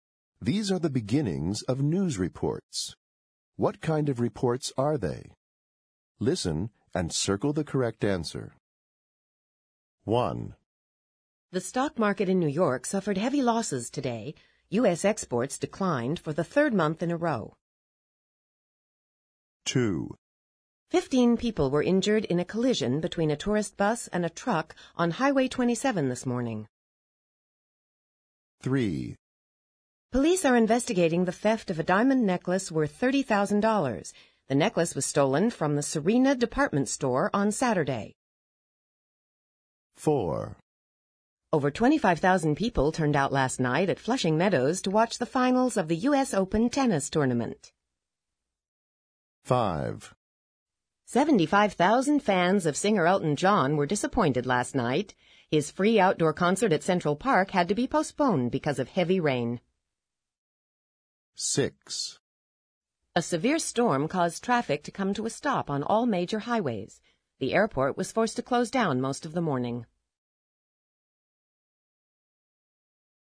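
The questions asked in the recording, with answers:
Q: What kind of reports are they?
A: business/economic news

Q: What kind of reports are they?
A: accident/traffic news

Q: What kind of reports are they?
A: crime news

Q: What kind of reports are they?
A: sports news

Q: What kind of reports are they?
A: entertainment/music news

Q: What kind of reports are they?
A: weather news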